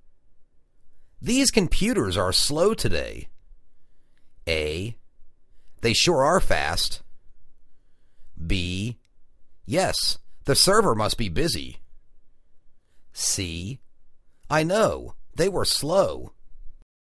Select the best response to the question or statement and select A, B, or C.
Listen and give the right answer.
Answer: Yes, the server must be busy.